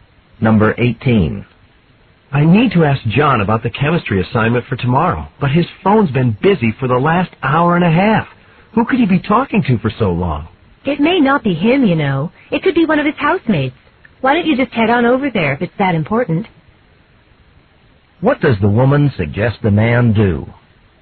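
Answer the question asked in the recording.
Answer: Go over to John's house.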